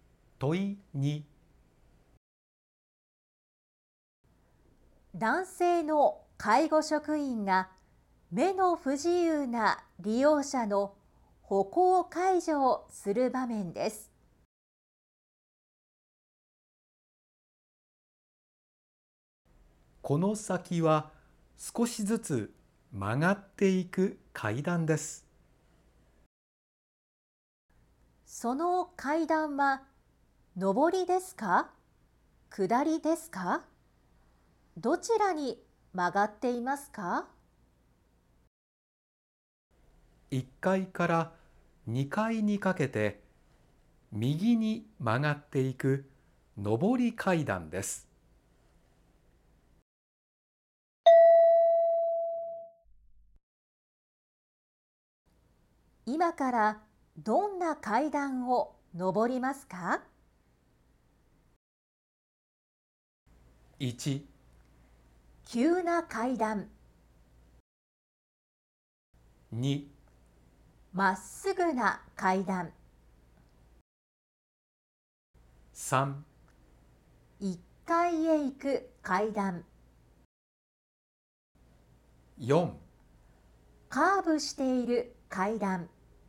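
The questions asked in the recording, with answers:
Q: 今からどんな階段を上りますか。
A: 4: カーブしている階段。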